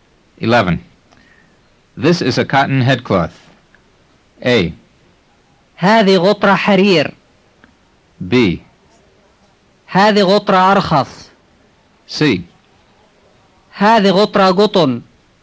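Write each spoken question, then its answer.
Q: This is a cotton headcloth.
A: C: هذه غطرة قطن.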